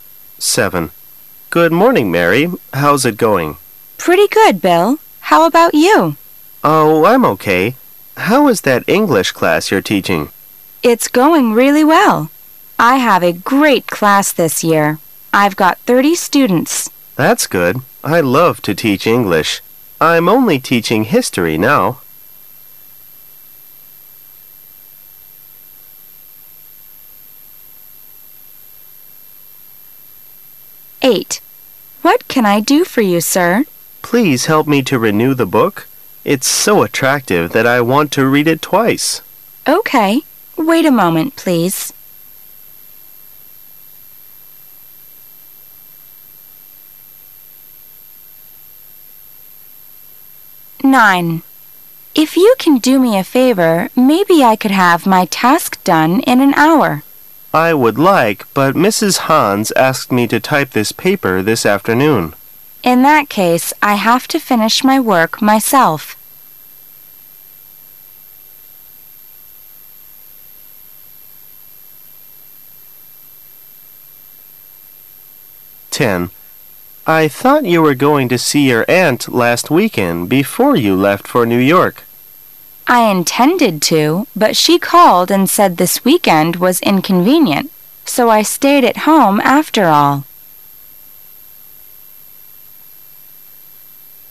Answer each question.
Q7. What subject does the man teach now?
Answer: History.

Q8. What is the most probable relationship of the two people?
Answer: Librarian and reader.

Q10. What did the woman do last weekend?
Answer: Stayed at home.